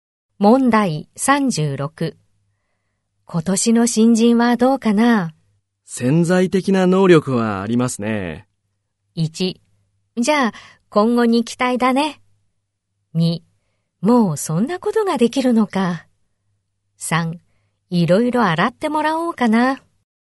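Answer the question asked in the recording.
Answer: 1: じゃあ今後に期待だね。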